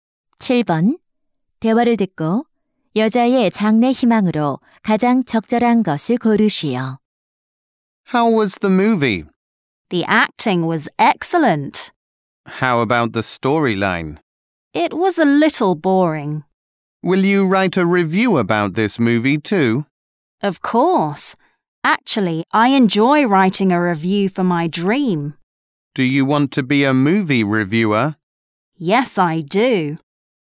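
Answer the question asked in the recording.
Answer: 영화 평론가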